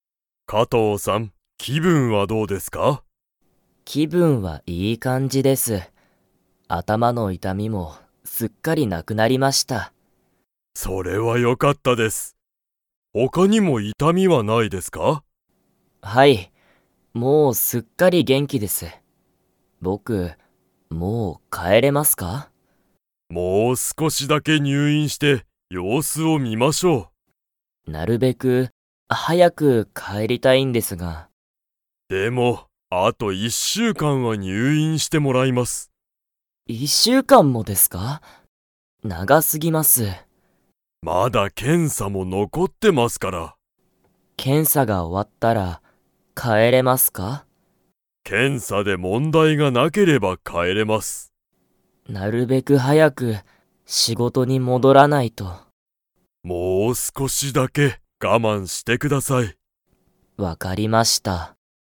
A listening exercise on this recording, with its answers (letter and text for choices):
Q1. 加藤(かとう)さんは、今(いま)、頭(あたま)の痛(いた)みはありますか?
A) はい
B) いいえ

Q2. で問題(もんだい)がなければ、加藤(かとう)さんは帰(かえ)れる。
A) 手術(しゅじゅつ)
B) 検査(けんさ)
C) 会社(かいしゃ)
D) 気分(きぶん)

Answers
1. B) いいえ
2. B) 検査(けんさ)

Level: Level 4